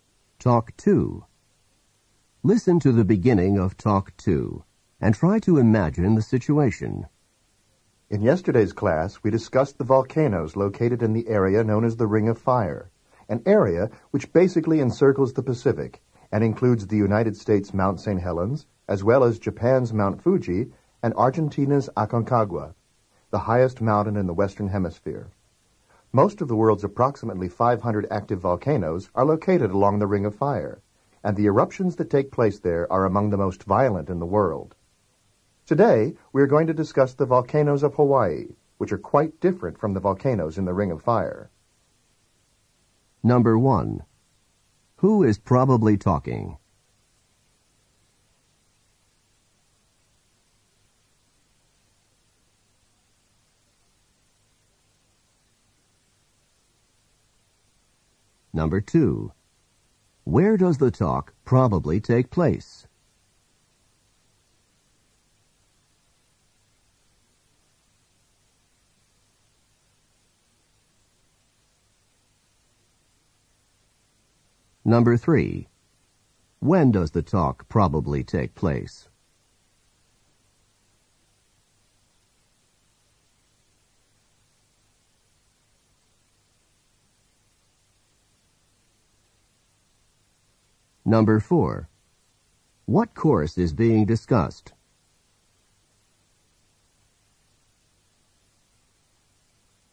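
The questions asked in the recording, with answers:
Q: Who is probably talking?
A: A professor

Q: Where does the talk probably take place?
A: In a classroom

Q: When does the talk probably take place?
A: The day after the class on Ring of Fire volcanoes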